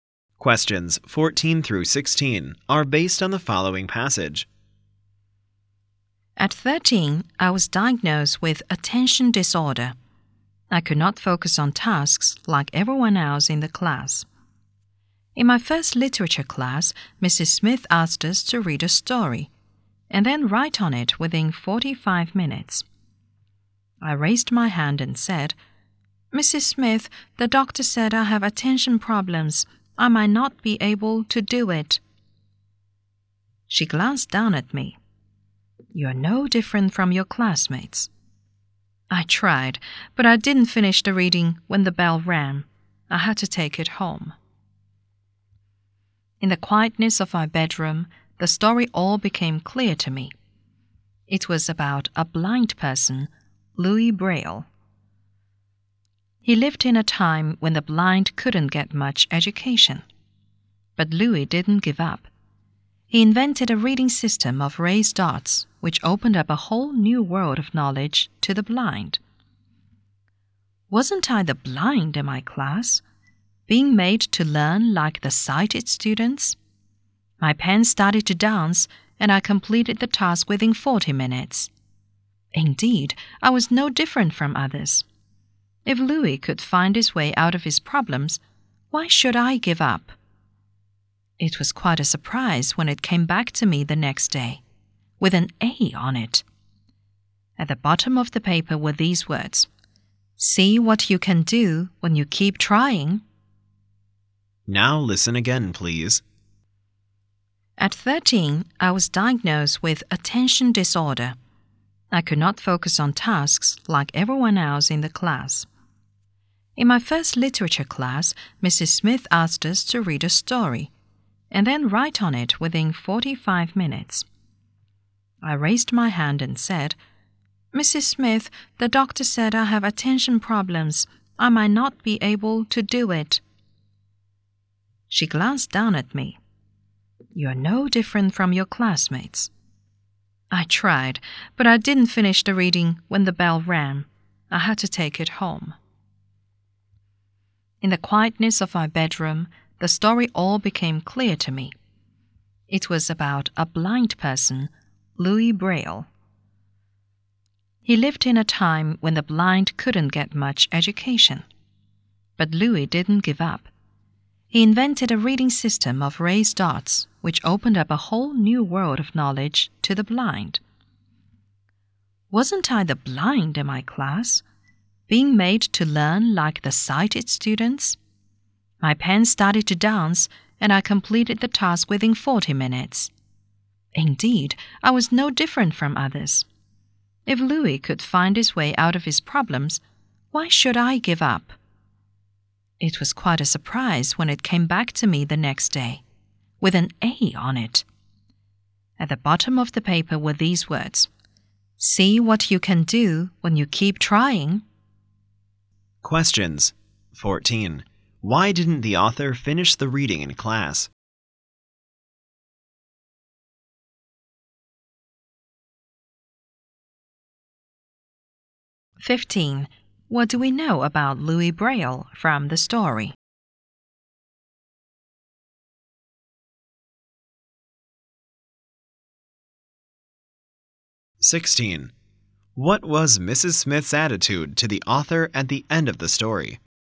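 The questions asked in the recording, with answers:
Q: Why didn't the author finish the reading in class?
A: He had attention disorder

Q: What do we know about Louis Braille from the story?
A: He was blind but didn't give up and invented a reading system for the blind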